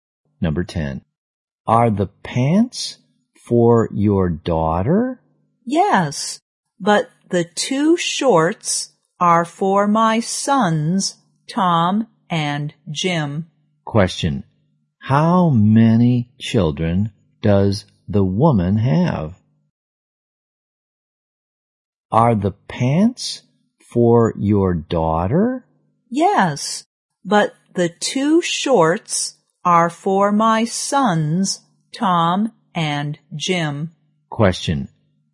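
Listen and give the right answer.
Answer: Three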